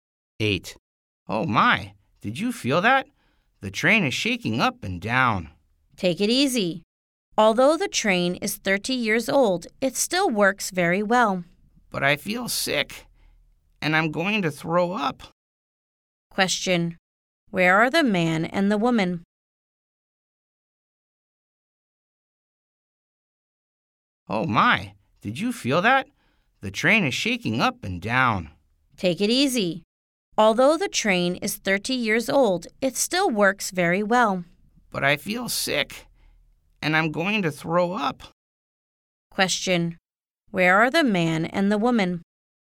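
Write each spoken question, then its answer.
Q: Where are the man and the woman?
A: On a train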